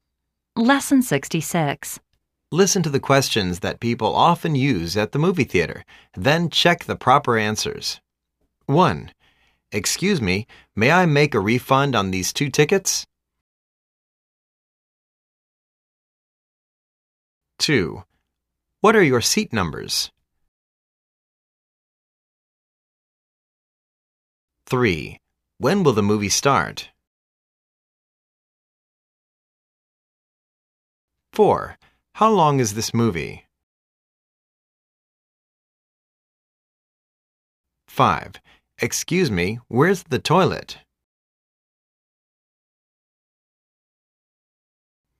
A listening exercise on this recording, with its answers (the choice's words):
Listen to the questions that people often use at the movie theater. Then, check the proper answers.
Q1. Excuse me. May I make a refu nd on these two tickets?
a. l'm sorry. We don't want to buy your tickets.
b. l'm sorry. The tickets aren't refundable.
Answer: l'm sorry. The tickets aren't refundable.

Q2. What are your seat numbers?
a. G32 and G33.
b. My contact number is 9883-6879.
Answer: G32 and G33.

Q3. When will the movie start?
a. Half an hour later.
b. lt'II last for two hours.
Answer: Half an hour later.

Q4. How long is this movie?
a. 15 miles.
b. Three hours and twenty minutes.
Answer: Three hours and twenty minutes.

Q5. Excuse me. Where's the toilet?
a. Go straight down to the gate in the front. After the gate it's on your right hand side.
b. l'm all right. I don't need to go to the toilet.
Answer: Go straight down to the gate in the front. After the gate it's on your right hand side.